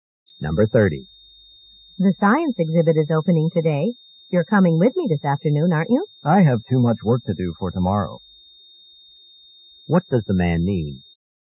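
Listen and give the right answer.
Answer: He can't go to the exhibit.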